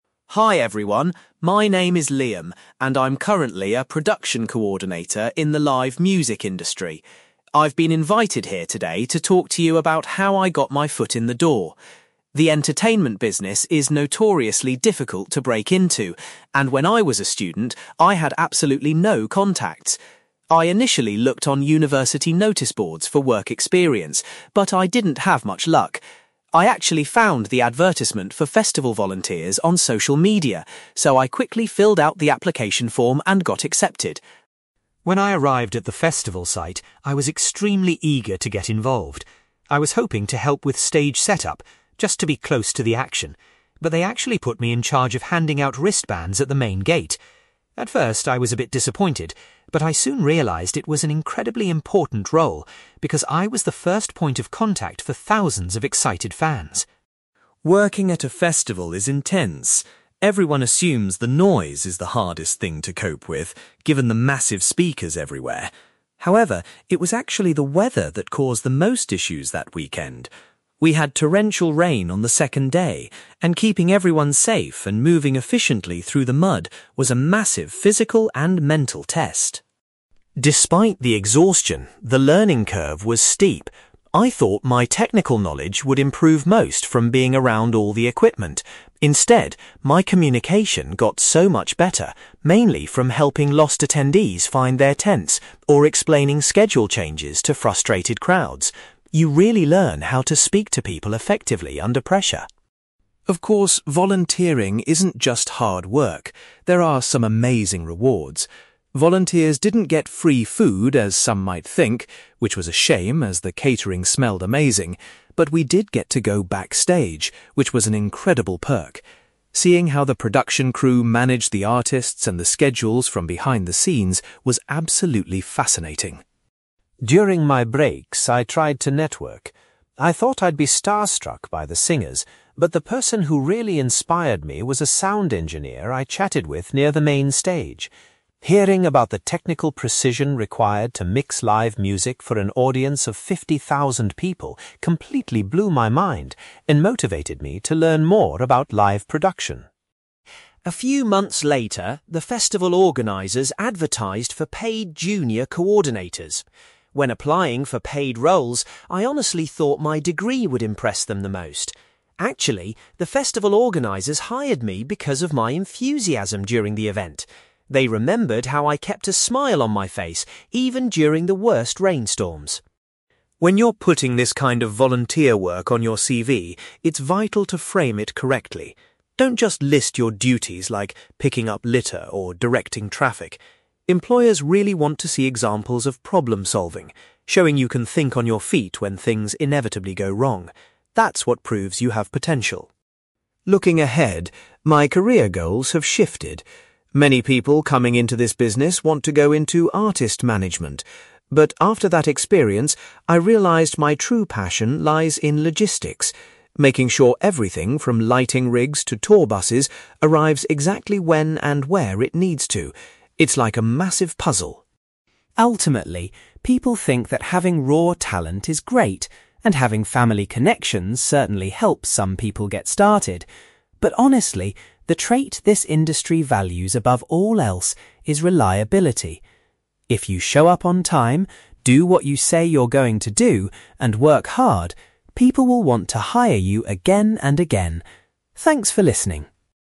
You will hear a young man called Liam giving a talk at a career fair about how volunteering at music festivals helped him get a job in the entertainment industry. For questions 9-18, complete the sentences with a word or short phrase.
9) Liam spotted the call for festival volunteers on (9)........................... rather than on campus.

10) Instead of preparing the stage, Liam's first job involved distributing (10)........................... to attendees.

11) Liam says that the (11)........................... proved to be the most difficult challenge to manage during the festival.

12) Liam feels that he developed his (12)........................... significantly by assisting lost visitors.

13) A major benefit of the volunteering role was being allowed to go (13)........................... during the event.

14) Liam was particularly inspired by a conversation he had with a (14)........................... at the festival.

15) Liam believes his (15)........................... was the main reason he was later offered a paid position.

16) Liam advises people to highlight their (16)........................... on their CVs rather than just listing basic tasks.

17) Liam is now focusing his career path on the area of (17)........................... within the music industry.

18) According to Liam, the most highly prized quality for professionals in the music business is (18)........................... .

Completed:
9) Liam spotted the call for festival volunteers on social media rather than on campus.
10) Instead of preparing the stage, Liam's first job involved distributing wristbands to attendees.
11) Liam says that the weather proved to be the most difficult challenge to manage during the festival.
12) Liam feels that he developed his communication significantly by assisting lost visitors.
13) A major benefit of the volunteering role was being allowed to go backstage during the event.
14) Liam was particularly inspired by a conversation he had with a sound engineer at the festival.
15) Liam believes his enthusiasm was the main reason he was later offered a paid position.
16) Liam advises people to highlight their problem-solving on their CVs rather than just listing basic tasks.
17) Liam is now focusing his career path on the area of logistics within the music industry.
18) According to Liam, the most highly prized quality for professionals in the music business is reliability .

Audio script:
Liam: Hi everyone, my name is Liam, and I'm currently a production coordinator in the live music industry. I've been invited here today to talk to you about how I got my foot in the door. The entertainment business is notoriously difficult to break into, and when I was a student, I had absolutely no contacts. I initially looked on university notice boards for work experience, but I didn't have much luck. I actually found the advertisement for festival volunteers on social media, so I quickly filled out the application form and got accepted.
When I arrived at the festival site, I was extremely eager to get involved. I was hoping to help with stage setup, just to be close to the action, but they actually put me in charge of handing out wristbands at the main gate. At first, I was a bit disappointed, but I soon realised it was an incredibly important role because I was the first point of contact for thousands of excited fans.
Working at a festival is intense. Everyone assumes the noise is the hardest thing to cope with, given the massive speakers everywhere. However, it was actually the weather that caused the most issues that weekend. We had torrential rain on the second day, and keeping everyone safe and moving efficiently through the mud was a massive physical and mental test.
Despite the exhaustion, the learning curve was steep. I thought my technical knowledge would improve most from being around all the equipment. Instead, my communication got so much better, mainly from helping lost attendees find their tents or explaining schedule changes to frustrated crowds. You really learn how to speak to people effectively under pressure.
Of course, volunteering isn't just hard work; there are some amazing rewards. Volunteers didn't get free food as some might think, which was a shame as the catering smelled amazing, but we did get to go backstage, which was an incredible perk. Seeing how the production crew managed the artists and the schedules from behind the scenes was absolutely fascinating.
During my breaks, I tried to network. I thought I'd be starstruck by the singers, but the person who really inspired me was a sound engineer I chatted with near the main stage. Hearing about the technical precision required to mix live music for an audience of fifty thousand people completely blew my mind and motivated me to learn more about live production.
A few months later, the festival organizers advertised for paid junior coordinators. When applying for paid roles, I honestly thought my degree would impress them the most. Actually, the festival organizers hired me because of my enthusiasm during the event. They remembered how I kept a smile on my face even during the worst rainstorms.
When you're putting this kind of volunteer work on your CV, it's vital to frame it correctly. Don't just list your duties like 'picking up litter' or 'directing traffic'. Employers really want to see examples of problem-solving, showing you can think on your feet when things inevitably go wrong. That's what proves you have potential.
Looking ahead, my career goals have shifted. Many people coming into this business want to go into artist management. But after that experience, I realized my true passion lies in logistics, making sure everything from lighting rigs to tour buses arrives exactly when and where it needs to. It's like a massive puzzle.
Ultimately, people think that having raw talent is great, and having family connections certainly helps some people get started. But honestly, the trait this industry values above all else is reliability. If you show up on time, do what you say you're going to do, and work hard, people will want to hire you again and again. Thanks for listening!

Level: B2